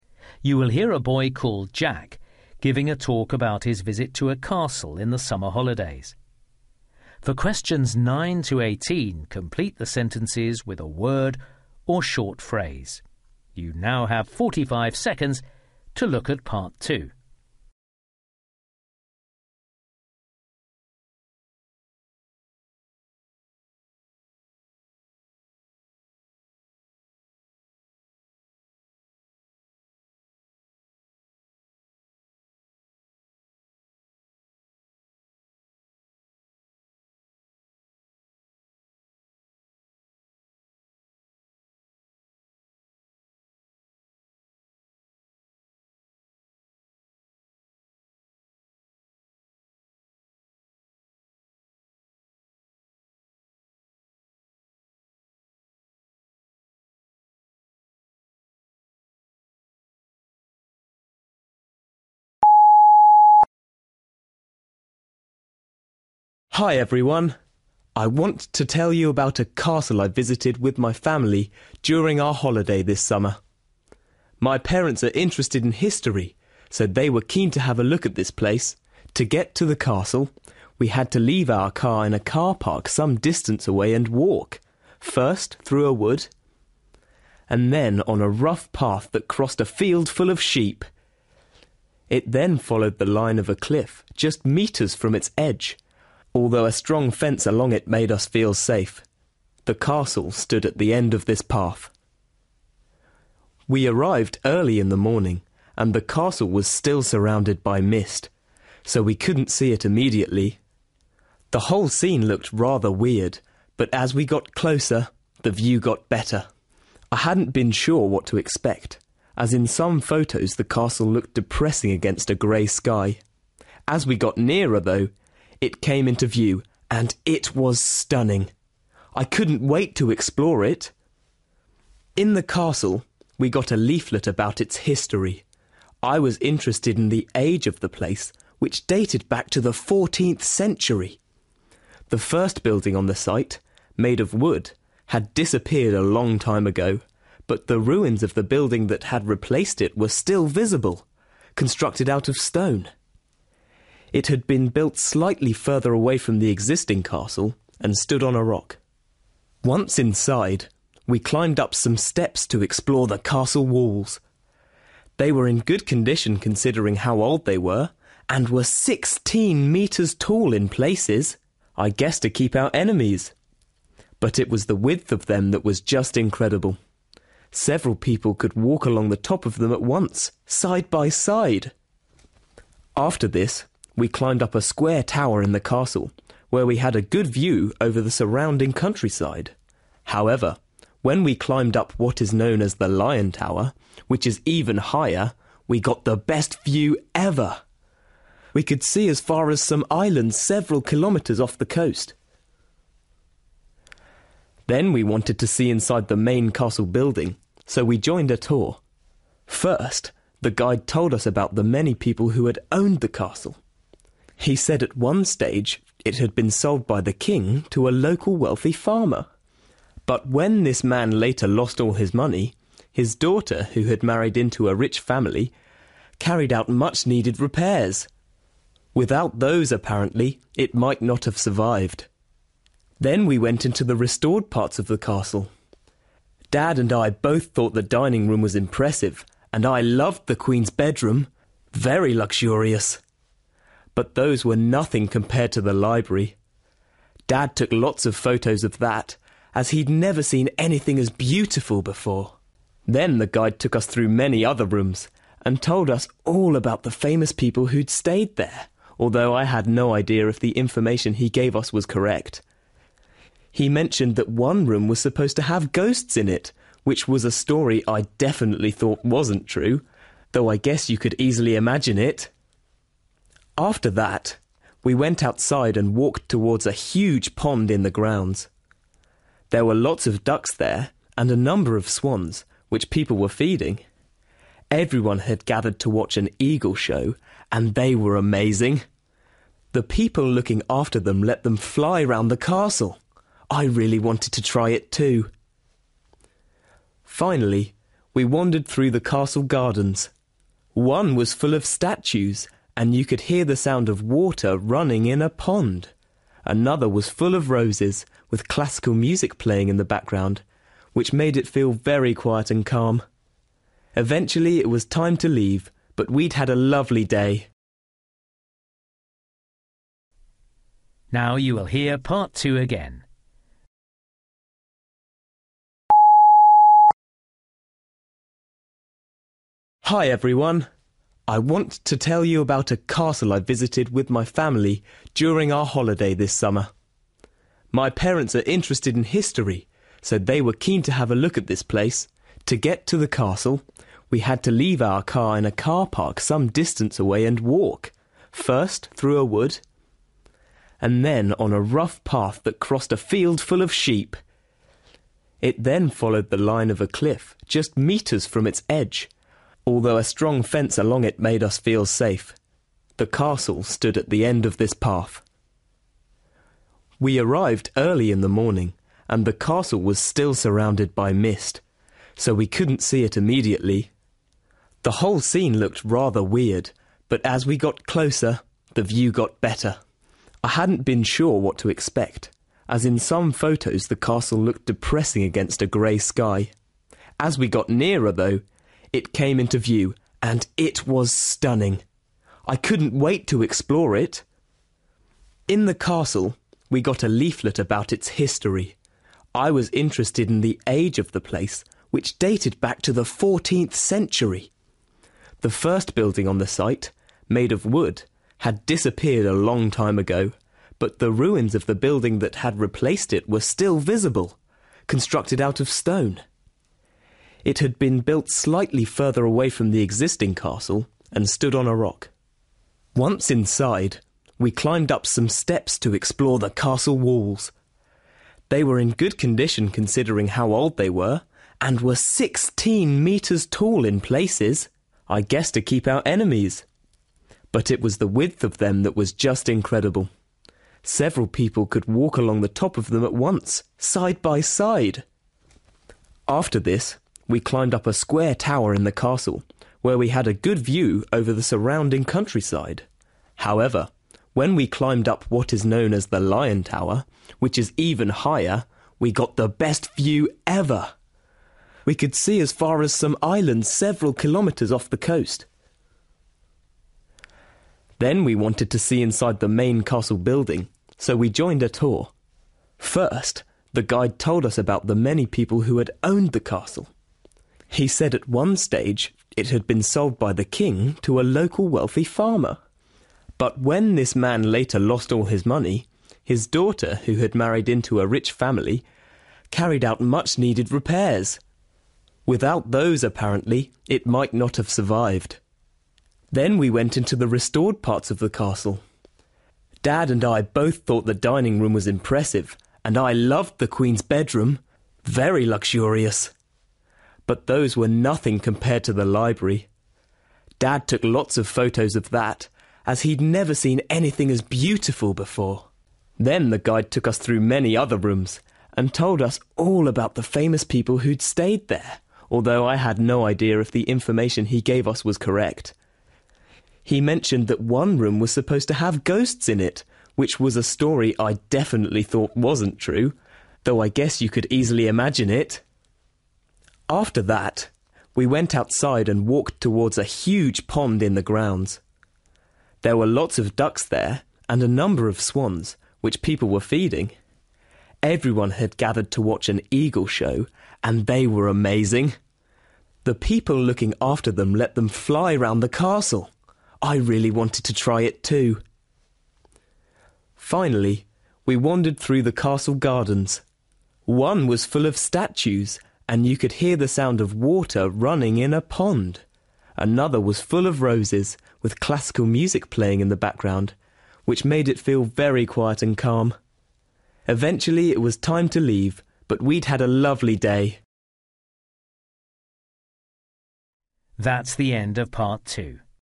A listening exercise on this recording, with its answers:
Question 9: Jack's route to the castle involved a path near the edge of a (9) .......................................... .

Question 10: Jack uses the word (10) .......................................... to describe his first impression of the castle.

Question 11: Jack discovered that the remains of an earlier castle made of (11) .......................................... could still be seen.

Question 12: Jack was surprised by the (12) .......................................... of the castle walls as they walked along the top of them.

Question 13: Jack was amazed at the view from the part of the castle called the (13) .......................................... that he visited.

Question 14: Jack learnt that many improvements to the castle had been made by the (14) .......................................... of a previous owner.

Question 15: Jack's father most enjoyed seeing the restored (15) .......................................... inside the castle.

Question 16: Jack decided he didn't believe the guide's story about (16) .......................................... in one area of the castle.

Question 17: Jack and his family were impressed by the (17) .......................................... display that they saw.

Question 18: Jack felt the (18) .......................................... in one of the gardens created a peaceful atmosphere.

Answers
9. cliff
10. stunning
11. stone
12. width
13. Lion Tower
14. daughter
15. library
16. ghosts
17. eagle
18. (classical) music

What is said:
Hi everyone! I want to tell you about a castle I visited with my family during our holiday this summer. My parents are interested in history, so they were keen to have a look at this place.
To get to the castle, we had to leave our car in a car park some distance away and walk, first through a wood, and then on a rough path that crossed a field full of sheep! It then followed the line of a cliff, just metres from its edge, although a strong fence along it made us feel safe! The castle stood at the end of this path.
We arrived early in the morning, and the castle was still surrounded by mist, so we couldn't see it immediately. The whole scene looked rather weird, but as we got closer, the view got better. I hadn't been sure what to expect, as in some photos the castle looked depressing against a grey sky. As we got nearer, though, it came into view – and it was stunning. I couldn't wait to explore it!
In the castle, we got a leaflet about its history. I was interested in the age of the place, which dated back to the 14th century. The first building on the site, made of wood, had disappeared a long time ago, but the ruins of the building that had replaced it were still visible, constructed out of stone. It had been built slightly further away from the existing castle and stood on a rock.
Once inside, we climbed up some steps to explore the castle walls. They were in good condition considering how old they were, and were 16 metres tall in places, I guess to keep out enemies! But it was the width of them that was just incredible. Several people could walk along the top of them at once, side by side!
After this, we climbed up a square tower in the castle, where we had a good view over the surrounding countryside. However, when we climbed up what is known as the Lion Tower, which is even higher, we got the best view ever. We could see as far as some islands several kilometres off the coast.
Then we wanted to see inside the main castle building, so we joined a tour. First, the guide told us about the many people who had owned the castle. He said at one stage, it had been sold by the King to a local wealthy farmer. But when this man later lost all his money, his daughter, who had married into a rich family, carried out much-needed repairs. Without those, apparently, it might not have survived!
Then we went into the restored parts of the castle. Dad and I both thought the dining room was impressive, and I loved the Queen's bedroom – very luxurious! But those were nothing compared to the library. Dad took lots of photos of that, as he'd never seen anything as beautiful before.
Then the guide took us through many other rooms, and told us all about the famous people who'd stayed there, although I had no idea if the information he gave us was correct. He mentioned that one room was supposed to have ghosts in it, which was a story I definitely thought wasn't true, though I guess you could easily imagine it!
After that, we went outside and walked towards a huge pond in the grounds. There were lots of ducks there, and a number of swans, which people were feeding. Everyone had gathered to watch an eagle show, and they were amazing – the people looking after them let them fly round the castle. I really wanted to try it too!
Finally, we wandered through the castle gardens. One was full of statues, and you could hear the sound of water running in a pond. Another was full of roses, with classical music playing in the background, which made it feel very quiet and calm.
Eventually it was time to leave – but we'd had a lovely day!

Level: B2